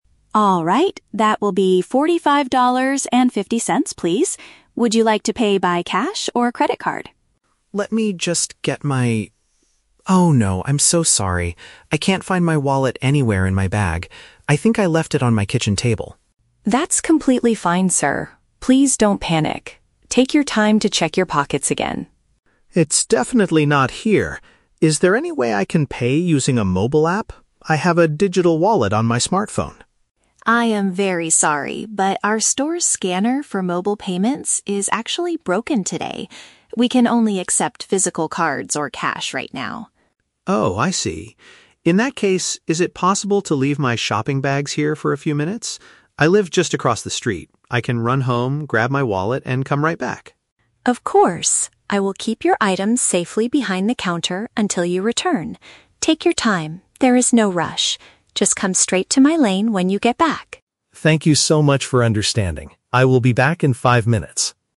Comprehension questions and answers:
Listen to a conversation between a customer and a supermarket cashier. For each question, choose the correct answer (A, B, or C).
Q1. What is the customer's main problem?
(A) He does not have enough money in his bank account to buy groceries.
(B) He forgot to bring his physical payment method with him to the store.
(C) He is complaining to the cashier about the total price of the items.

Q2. Why can't the customer use his smartphone to pay for his shopping?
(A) The shop's digital payment system is currently not working.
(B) His mobile phone battery died before he reached the counter.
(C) The cashier does not know how to use the modern e-wallet application.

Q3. What does the cashier agree to do to help the customer?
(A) Cancel the entire order and put all the groceries back on the shelves.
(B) Offer a special discount because of the technical issue with the scanner.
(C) Hold the customer's unbought items while he goes home to get his money.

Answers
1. (B) He forgot to bring his physical payment method with him to the store.
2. (A) The shop's digital payment system is currently not working.
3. (C) Hold the customer's unbought items while he goes home to get his money.

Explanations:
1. The customer says, "I can't find my wallet... I think I left it on my kitchen table" (forgot to bring his physical payment method). Option (A) is a trap; he has money, he just forgot his wallet. Option (C) is a trap; he is apologizing, not arguing or complaining about the $45.50 total.
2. The cashier explains that the "scanner for mobile payments is actually broken today" (the digital payment system is currently not working). Option (B) is a trap; his phone is fine because he says "I have a digital wallet on my smartphone." Option (C) is not mentioned.
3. The customer asks to "leave my shopping bags here" while he runs home to grab his wallet, and the cashier agrees: "I will keep your items safely behind the counter until you return." Option (A) is a trap; the cashier does not cancel the order or return the items to the shelves. Option (B) is a trap; there is no discount offered.

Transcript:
Would you like to pay by cash or credit card?
Customer: Let me just get my... Oh no. I'm so sorry. I can't find my wallet anywhere in my bag. I think I left it on my kitchen table.
Cashier: That's completely fine, sir. Please don't panic. Take your time to check your pockets again.
Customer: It's definitely not here. Is there any way I can pay using a mobile app? I have a digital wallet on my smartphone.
Cashier: I am very sorry, but our store's scanner for mobile payments is actually broken today. We can only accept physical cards or cash right now.
Customer: Oh, I see. In that case, is it possible to leave my shopping bags here for a few minutes? I live just across the street. I can run home, grab my wallet, and come right back.
Cashier: Of course. I will keep your items safely behind the counter until you return. Take your time, there is no rush. Just come straight to my lane when you get back.

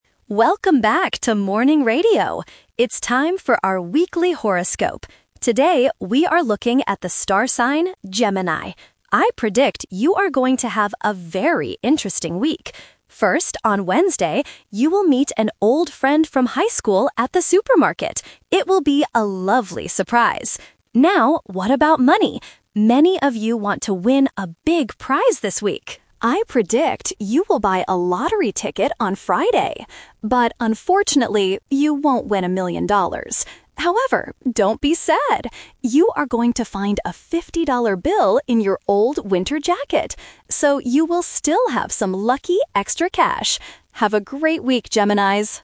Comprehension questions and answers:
Listen to the radio DJ talking about a horoscope. Choose the correct answer (A, B, or C).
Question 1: Who will the Gemini listener meet on Wednesday?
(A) A supermarket worker.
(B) A high school friend.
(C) A new friend.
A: (B) A high school friend.

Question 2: What is the DJ's prediction about the lottery?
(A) The listener will win a million dollars.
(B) The listener won't buy a lottery ticket.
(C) The listener will buy a ticket but won't win.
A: (C) The listener will buy a ticket but won't win.

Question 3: How will the listener get some extra money?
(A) They will find it in a jacket.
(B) They will find it at the supermarket.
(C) Their old friend will give it to them.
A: (A) They will find it in a jacket.

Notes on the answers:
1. The DJ explicitly says, "you will meet an old friend from high school..."
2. The DJ predicts, "you will buy a lottery ticket on Friday. But, unfortunately, you won't win a million dollars."
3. The DJ gives good news at the end: "You are going to find a fifty-dollar bill in your old winter jacket."

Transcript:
Welcome back to Morning Radio! It's time for our weekly horoscope. Today, we are looking at the star sign, Gemini. I predict you are going to have a very interesting week. First, on Wednesday, you will meet an old friend from high school at the supermarket. It will be a lovely surprise!
Now, what about money? Many of you want to win a big prize this week. I predict you will buy a lottery ticket on Friday. But, unfortunately, you won't win a million dollars. However, don't be sad! You are going to find a fifty-dollar bill in your old winter jacket. So, you will still have some lucky extra cash! Have a great week, Geminis!

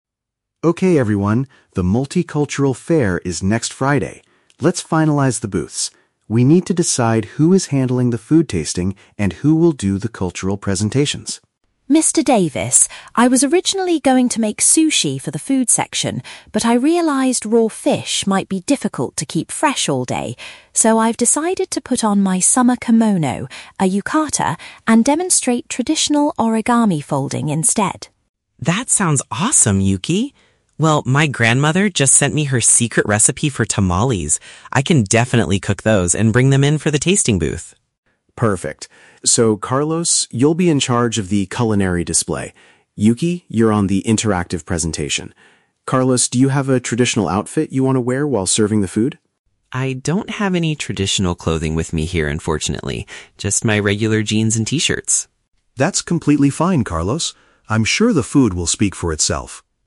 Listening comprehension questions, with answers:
Listen to a conversation between a teacher and two international students. Choose the correct answer (A, B, or C) for each question.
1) What is Yuki's final decision for the fair?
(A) She will prepare a famous raw seafood dish.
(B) She will show visitors how to create paper art.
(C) She will sell traditional Japanese clothing.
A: (B) She will show visitors how to create paper art.

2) Why did Yuki change her original plan?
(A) She was worried about food safety during the long event.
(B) She could not find the right ingredients at the local market.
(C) She thought making the food would take too much time.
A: (A) She was worried about food safety during the long event.

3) What will Carlos contribute to the event?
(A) He will wear a special costume from his home country.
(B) He will help the teacher set up the presentation booth.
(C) He will prepare a family dish for people to taste.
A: (C) He will prepare a family dish for people to taste.

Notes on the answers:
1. Yuki says she will "demonstrate traditional origami folding" (show visitors how to create paper art). Option (A) is a trap; she originally planned to make sushi (seafood) but changed her mind. Option (C) is a trap; she will "put on" (wear) the kimono, not sell it.
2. Yuki explains that "raw fish might be difficult to keep fresh all day" (worried about food safety). Options (B) and (C) are plausible reasons for changing a cooking plan, but they are never mentioned in the conversation.
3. Carlos mentions his grandmother's "secret recipe for tamales" and says he will "cook those" for the "tasting booth" (a family dish for people to taste). Option (A) is a trap; the teacher asks if he has a traditional outfit, but Carlos says he only has "regular jeans and t-shirts". Option (B) is incorrect.

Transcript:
Mr. Davis: Okay everyone, the Multicultural Fair is next Friday. Let's finalize the booths. We need to decide who is handling the food tasting and who will do the cultural presentations.
Yuki: Mr. Davis, I was originally going to make sushi for the food section, but I realized raw fish might be difficult to keep fresh all day. So, I've decided to put on my summer kimono—a yukata—and demonstrate traditional origami folding instead.
Carlos: That sounds awesome, Yuki! Well, my grandmother just sent me her secret recipe for tamales. I can definitely cook those and bring them in for the tasting booth.
Mr. Davis: Perfect. So Carlos, you'll be in charge of the culinary display. Yuki, you're on the interactive presentation. Carlos, do you have a traditional outfit you want to wear while serving the food?
Carlos: I don't have any traditional clothing with me here, unfortunately. Just my regular jeans and t-shirts.
Mr.

